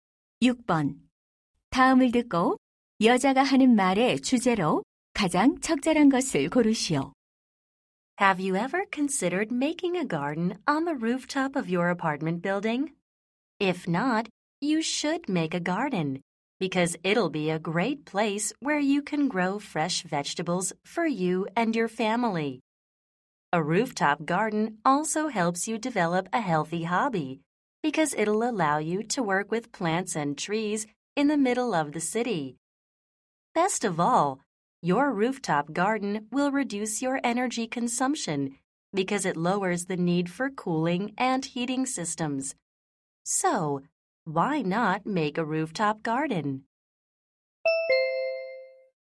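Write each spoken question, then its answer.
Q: 다음을 듣고 여자가 하는 말의 주제로 가장 적절한 것을 고르시오.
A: 옥상 정원의 이점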